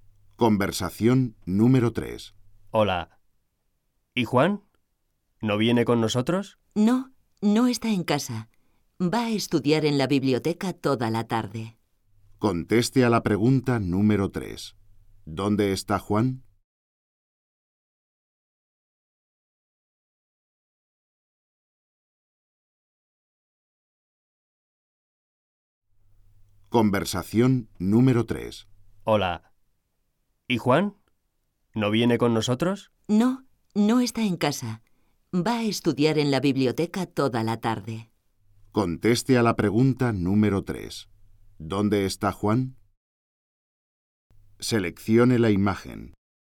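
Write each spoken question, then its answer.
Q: ¿Dónde está Juan?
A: En la biblioteca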